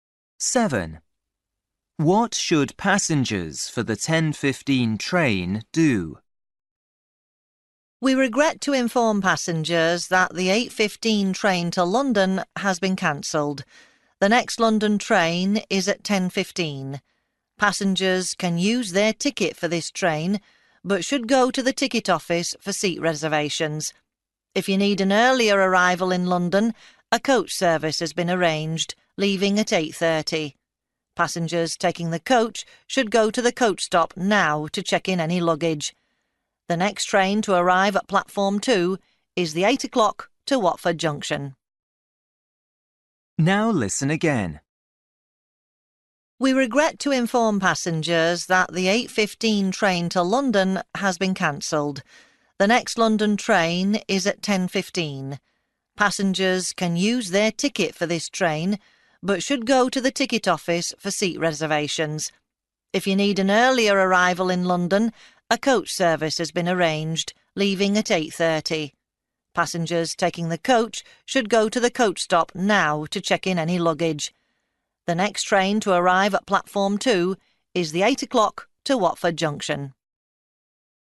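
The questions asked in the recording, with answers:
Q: What should passengers for the 10:15 train do?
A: Go to the ticket office for seat reservations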